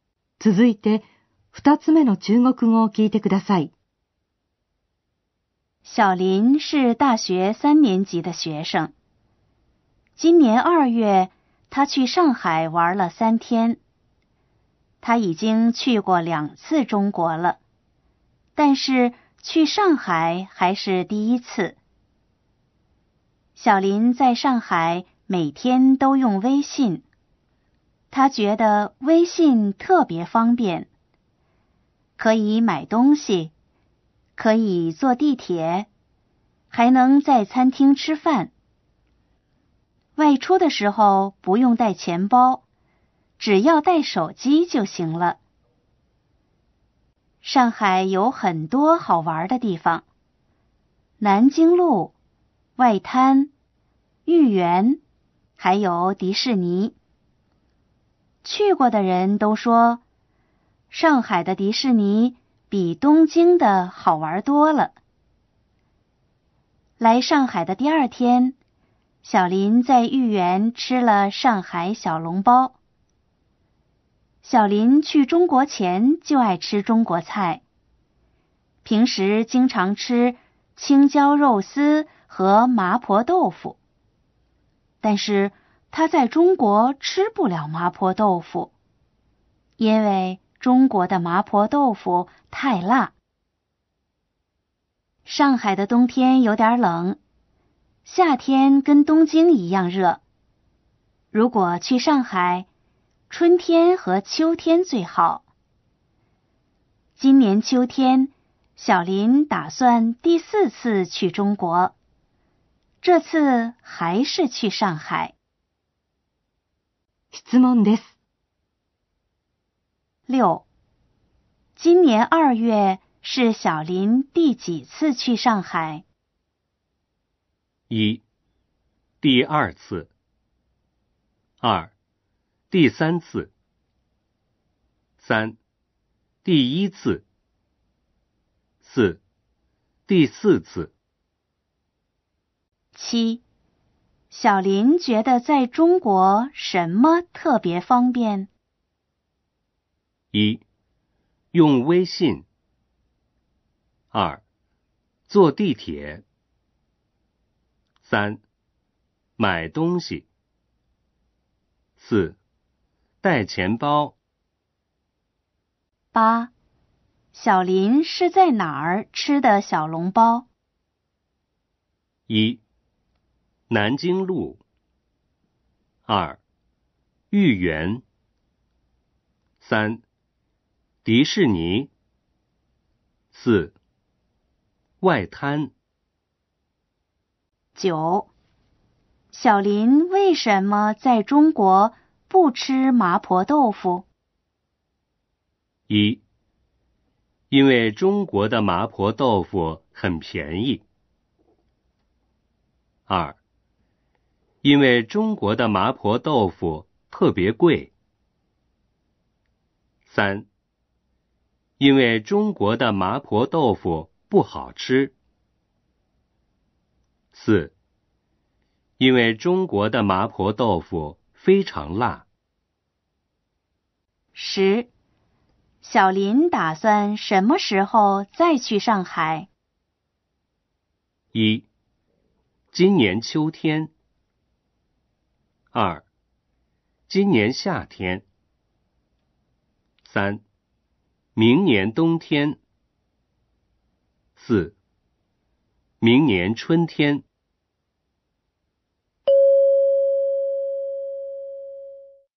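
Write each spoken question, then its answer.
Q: 今年二月是小林第几次去上海?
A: 三: 第一次。

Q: 小林觉得在中国什么特别方便?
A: 一: 用微信。

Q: 小林是在哪儿吃的小笼包?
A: 二: 豫园。

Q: 小林为什么在中国不吃麻婆豆腐?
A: 四: 因为中国的麻婆豆腐非常辣。

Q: 小林打算什么时候再去上海?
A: 一: 今年秋天。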